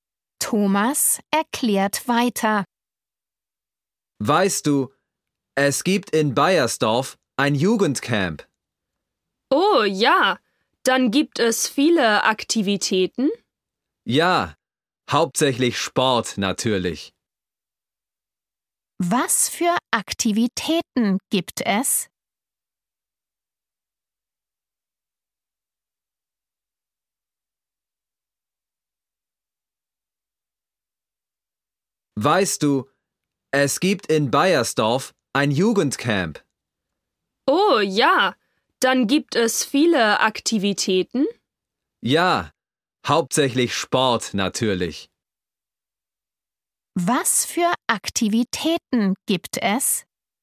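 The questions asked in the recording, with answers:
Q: Was für Aktivitäten gibt es?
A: Hauptsächlich Sport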